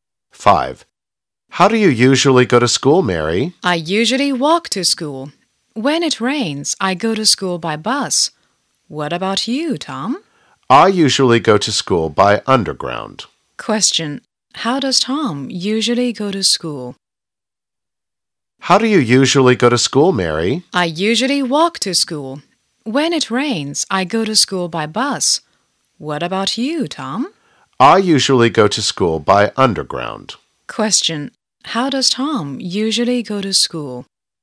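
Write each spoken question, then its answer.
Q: How does Tom usually go to school?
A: By underground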